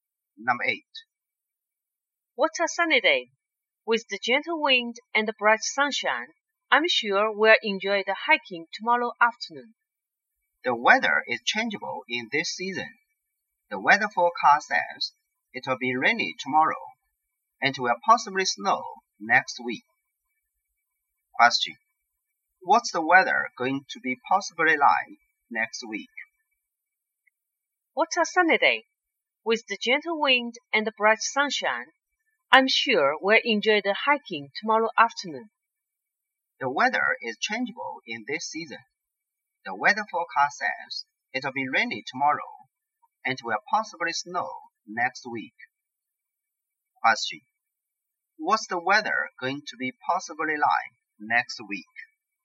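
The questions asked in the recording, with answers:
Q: What's the weather going to be possibly like next week?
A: Snowy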